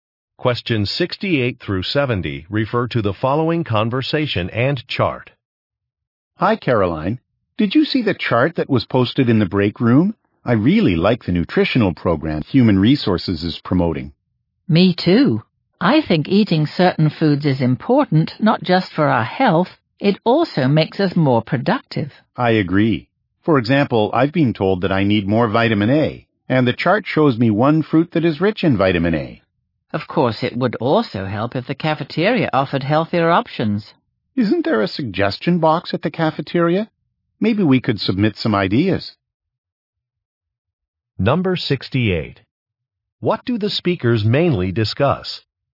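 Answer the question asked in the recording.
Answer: A nutritional program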